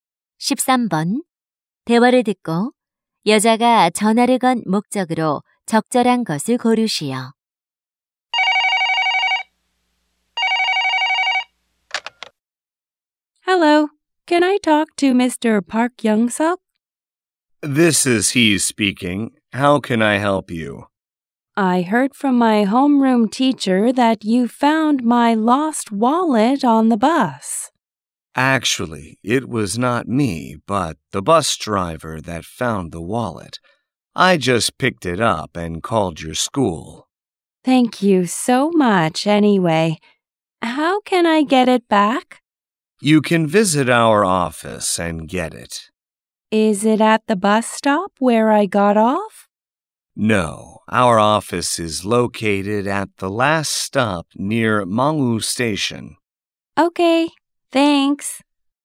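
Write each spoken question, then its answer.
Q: 대화를 듣고 여자가 전화를 건 목적으로 적절한 것을 고르시오.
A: 잃어버린 지갑을 되찾는 방법을 묻기 위해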